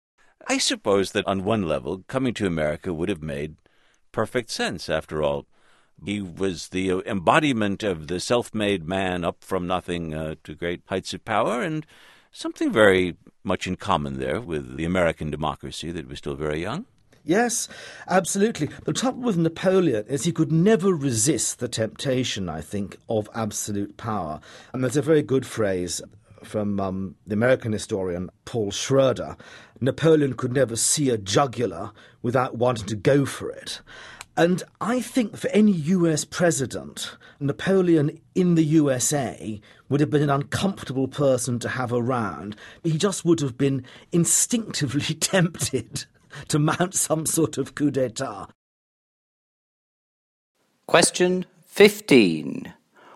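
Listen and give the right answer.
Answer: No, he would have been tempted to seize absolute power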